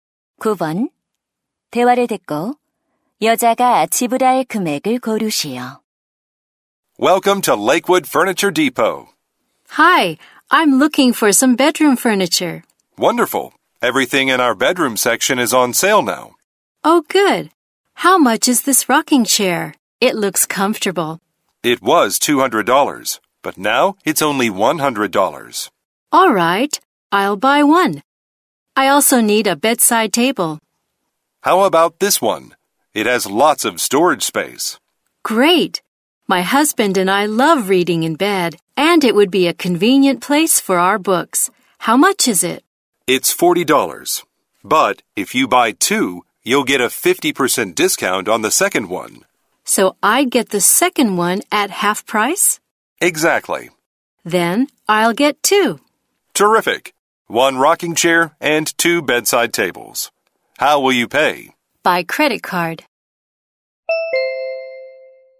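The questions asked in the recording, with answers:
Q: 대화를 듣고 여자가 지불할 금액을 고르시오.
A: $160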